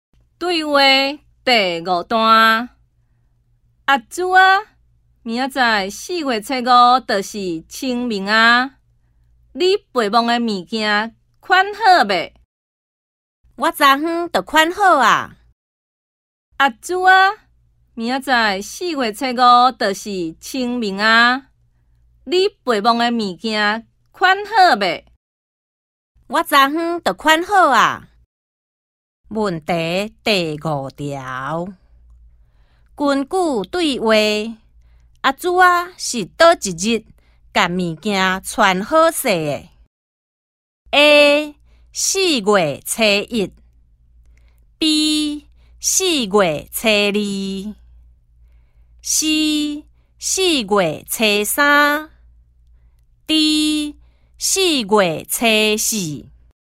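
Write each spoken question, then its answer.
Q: 根据对话,阿珠啊是倒一日把物件穿好势的 ?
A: C: 四月初三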